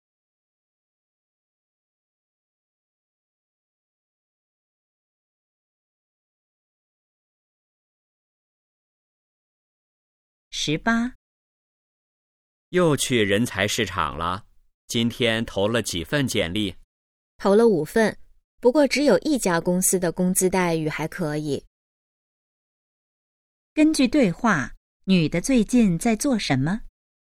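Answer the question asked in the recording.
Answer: 找工作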